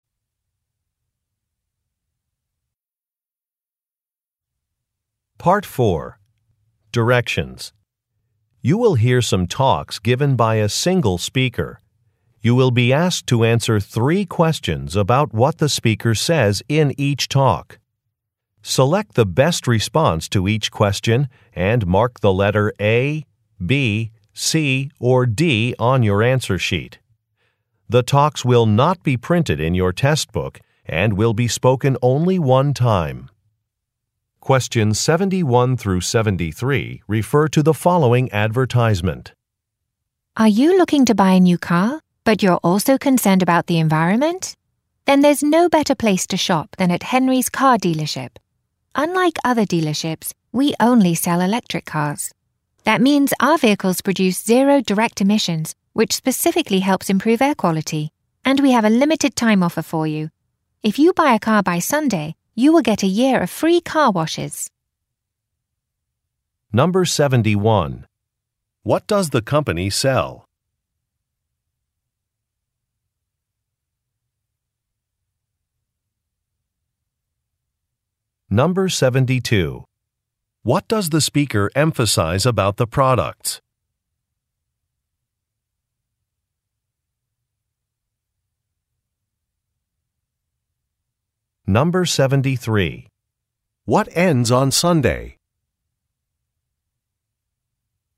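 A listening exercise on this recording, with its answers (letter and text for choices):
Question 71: What does the company sell?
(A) Racing bicycles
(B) Motorcycle parts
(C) Camping equipment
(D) Electric cars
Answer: (D) Electric cars

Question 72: What does the speaker emphasize about the products?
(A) They are safe for the environment.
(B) They come with an extended warranty.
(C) They can be used with a mobile application.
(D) They are designed for all weather conditions.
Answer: (A) They are safe for the environment.

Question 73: What ends on Sunday?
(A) A contest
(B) A festival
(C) A factory tour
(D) A special offer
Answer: (D) A special offer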